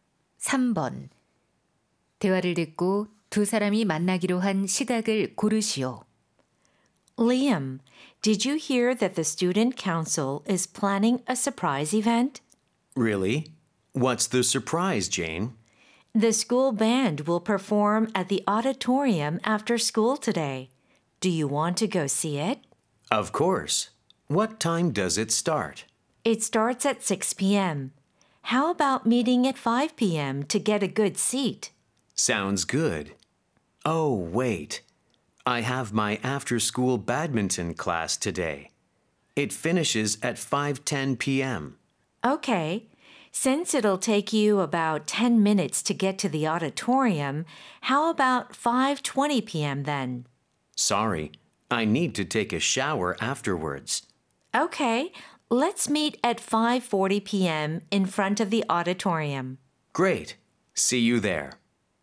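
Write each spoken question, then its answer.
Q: 대화를 듣고 두 사람이 만나기로 한 시각을 고르시오.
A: 오후 5시 40분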